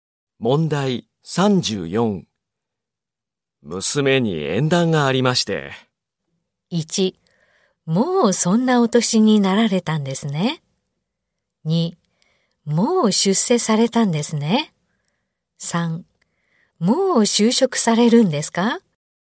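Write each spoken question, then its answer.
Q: 娘に縁談がありまして。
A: 1: もうそんなお年になられたんですね。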